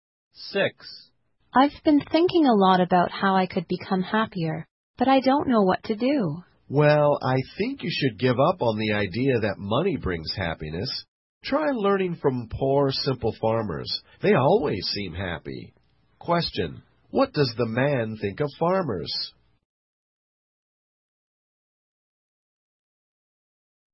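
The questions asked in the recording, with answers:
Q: what does the man think of farmers?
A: They always seem happy.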